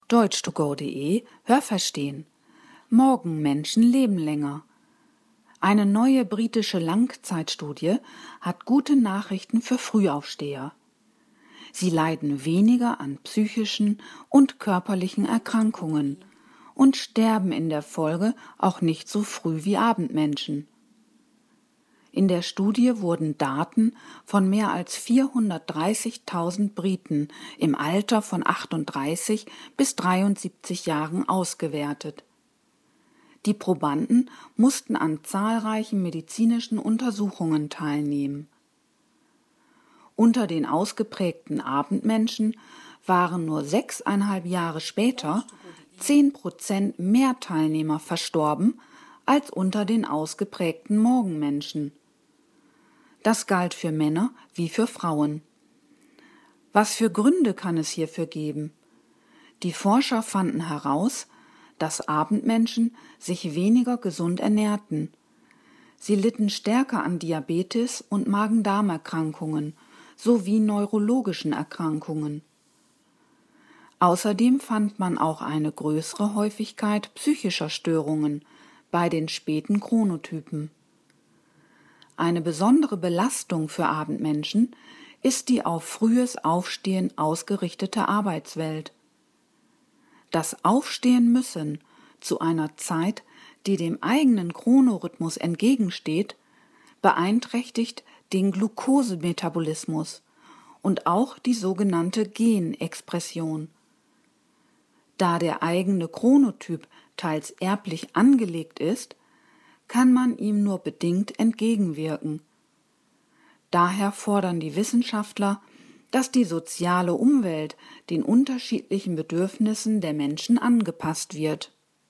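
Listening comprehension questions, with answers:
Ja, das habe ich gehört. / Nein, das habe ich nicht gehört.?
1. In Deutschland wurden in einer großen Langzeitstudie verschiedene Chronotypen untersucht.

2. Es wurden Daten von über 430.000 Briten im Alter von 18 bis 73 Jahren erhoben.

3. Die Sterblichkeit unter den Teilnehmern war beim späten Chronotyp höher als beim frühen.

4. Die Ergebnisse der Studie betrafen Männer und Frauen gleichermaßen.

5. Abendmenschen wiesen im Vergleich zu Frühaufstehern mehr körperliche und seelische Beeinträchtigungen auf.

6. Glukosemetabolismus und Genexpression werden durch die Arbeitswelt negativ beeinflusst.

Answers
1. Nein, das habe ich nicht gehört.
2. Nein, das habe ich nicht gehört.
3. Ja, das habe ich gehört.
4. Ja, das habe ich gehört.
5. Ja, das habe ich gehört.
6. Ja, das habe ich gehört.

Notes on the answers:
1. Die Studie wurde in Großbritannien durchgeführt.
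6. Das Aufstehen-Müssen zu einer dem eigenen Chronorhythmus entgegenstehenden Zeit führt hier zu einer negativen Beeinflussung.

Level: C2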